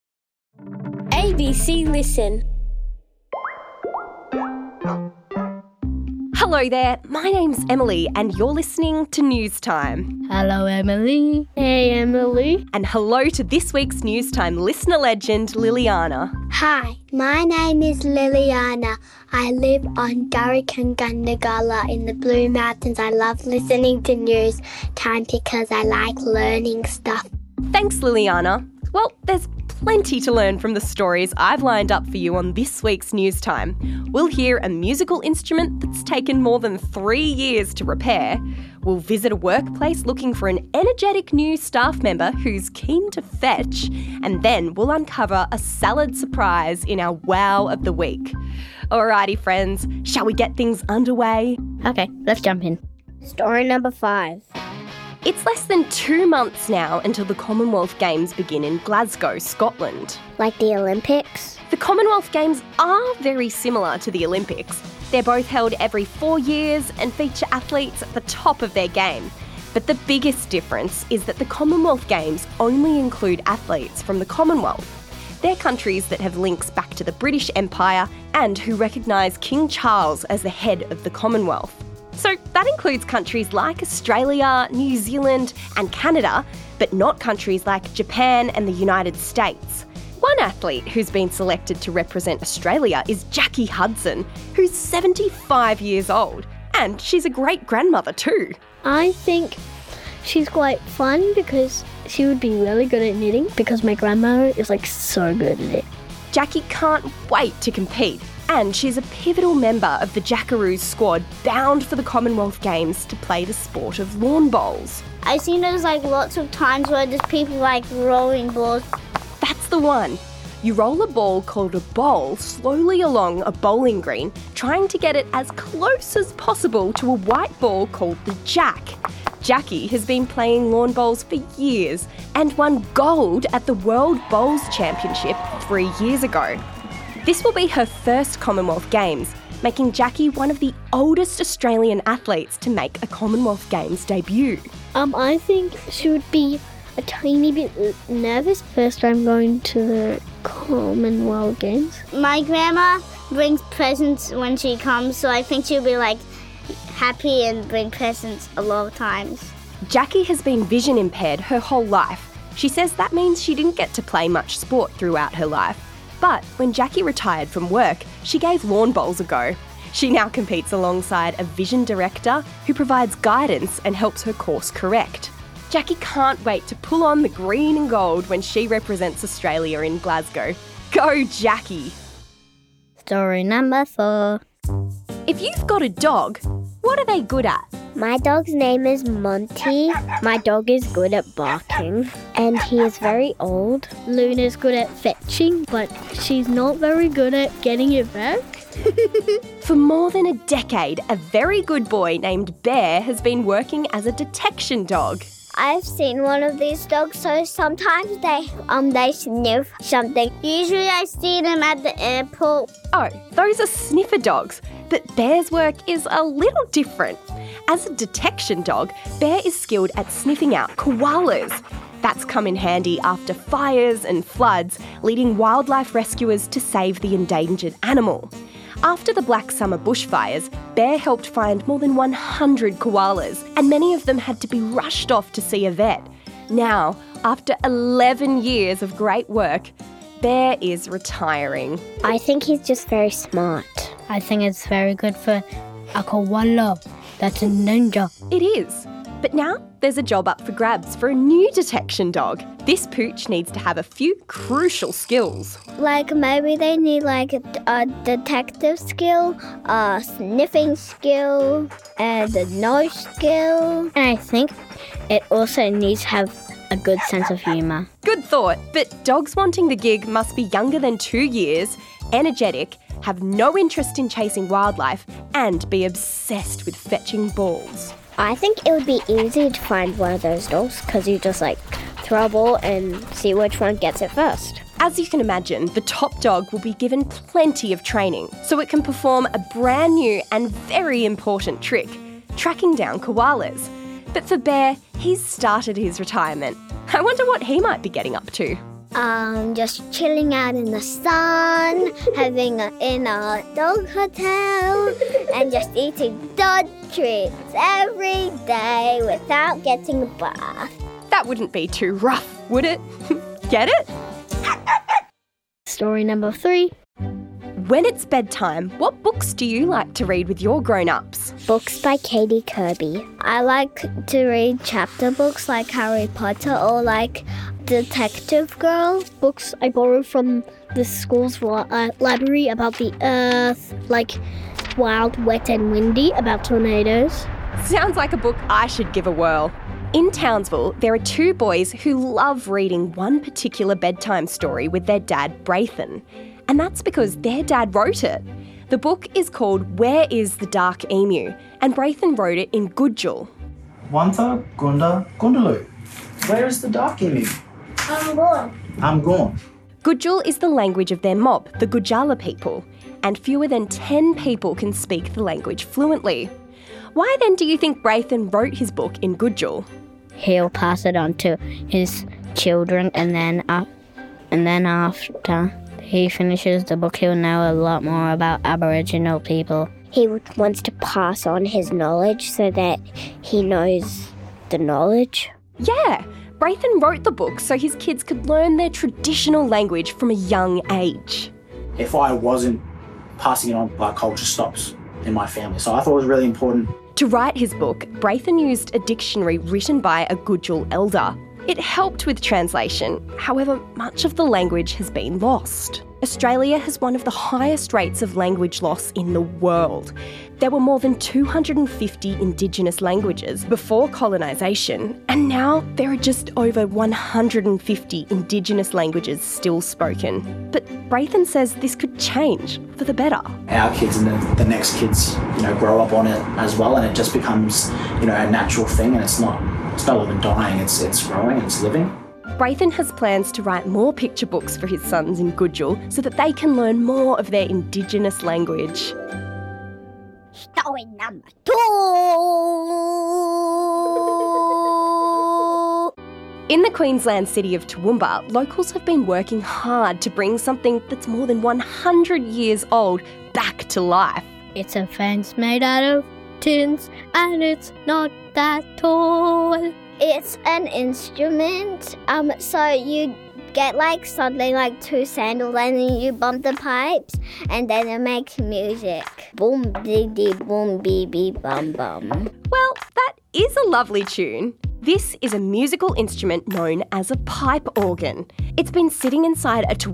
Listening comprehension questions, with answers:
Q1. How old is lawn bowler Jacky Hudson?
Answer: 75